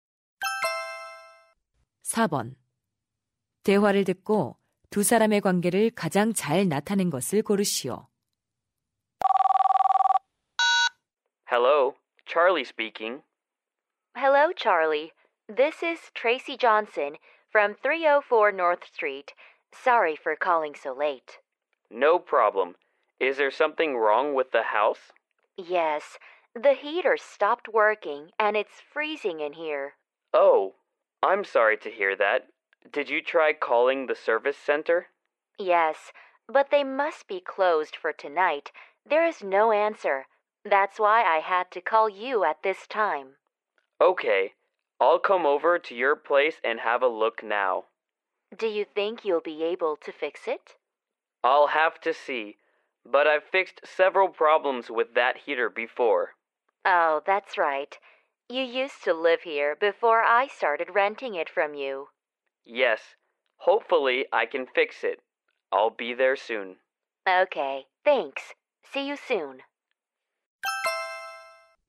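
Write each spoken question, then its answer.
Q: 대화를 듣고 두 사람의 관계를 가장 잘 나타낸 것을 고르시오.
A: 세입자 – 집주인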